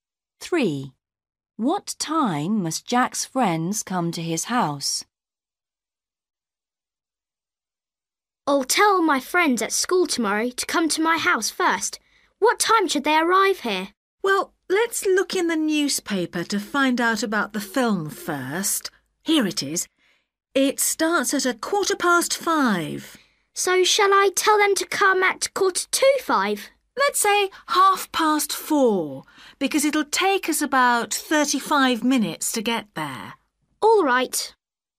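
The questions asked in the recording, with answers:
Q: What time must Jack's friends come to his house?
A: 4:30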